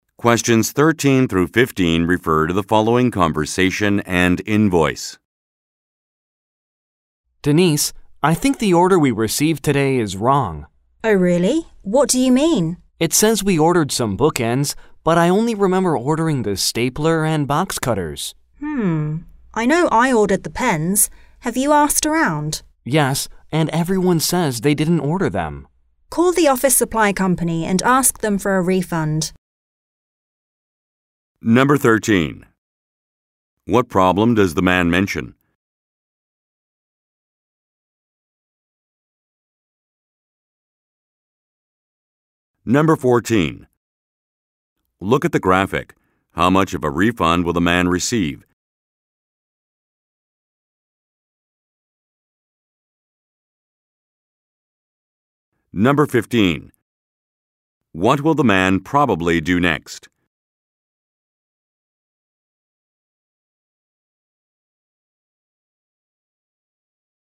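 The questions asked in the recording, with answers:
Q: What problem does the man mention?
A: The order includes bookends that nobody ordered.

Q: What will the man probably do next?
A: Call the office supply company to ask for a refund.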